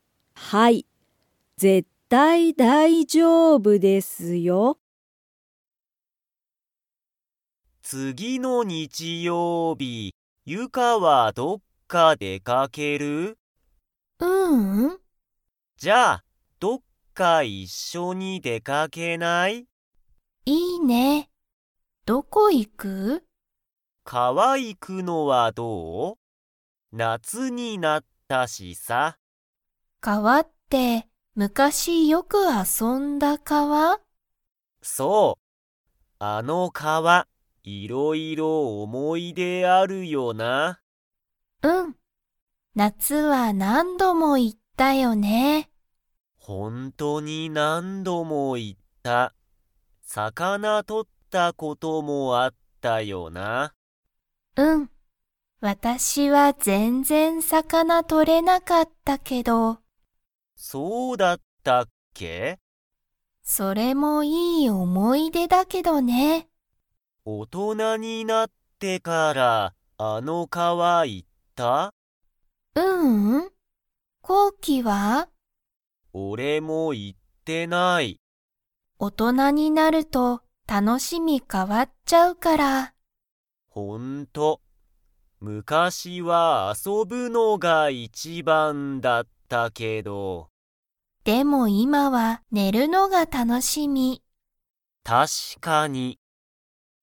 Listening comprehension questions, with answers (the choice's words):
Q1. コウキとユカは、昔むかしどこでよく遊あそびましたか?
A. 川かわ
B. 海うみ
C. 山やま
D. 学校がっこう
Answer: 川かわ

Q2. ユカは今いま、遊あそぶのが楽たのしみですか?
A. はい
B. いいえ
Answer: いいえ

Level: Level 3